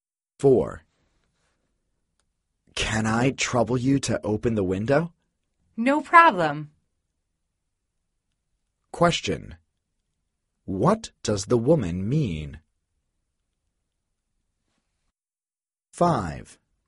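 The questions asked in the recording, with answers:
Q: What does the woman mean?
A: She will open the window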